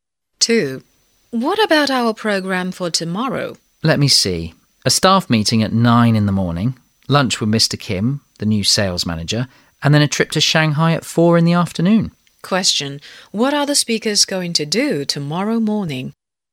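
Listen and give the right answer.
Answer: Attend a staff meeting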